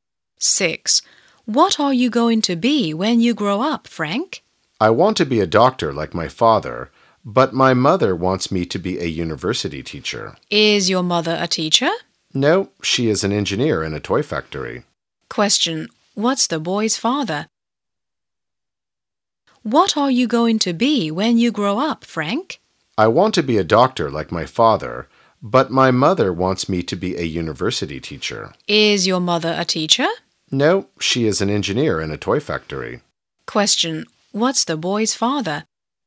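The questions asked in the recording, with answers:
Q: What's the boy's father?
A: A doctor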